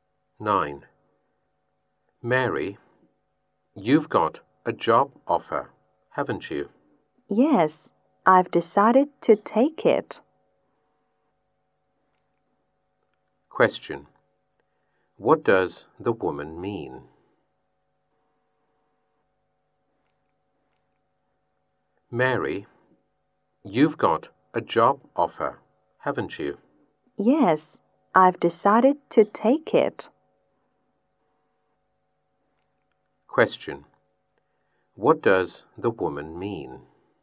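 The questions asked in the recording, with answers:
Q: What does the woman mean?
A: She has decided to take the job offer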